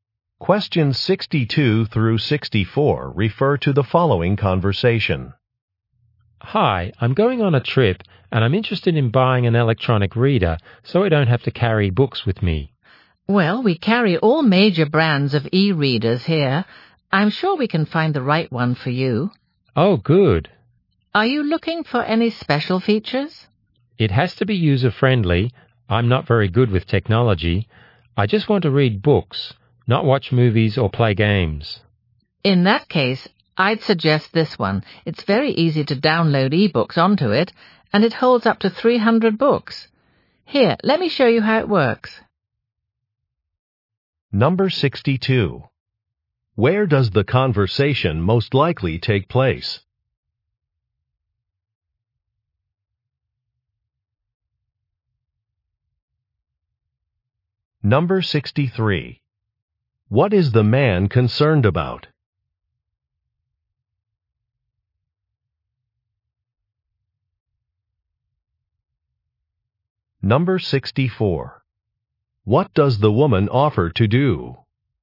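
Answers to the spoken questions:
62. In an electronics store
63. Ease of use
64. Show him how the e-reader works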